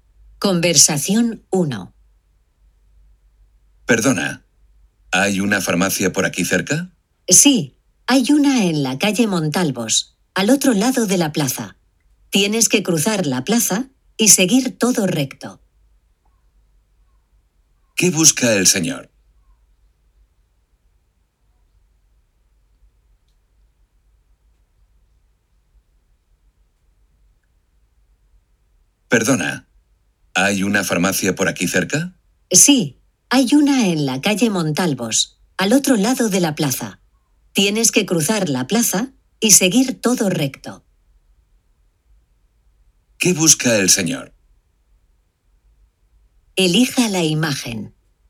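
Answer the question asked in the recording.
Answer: Una farmacia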